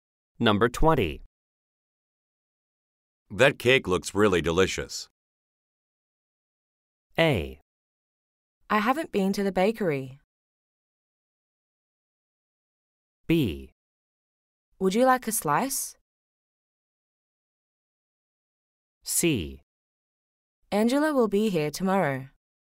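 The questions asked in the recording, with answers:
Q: That cake looks really delicious.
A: B: Would you like a slice?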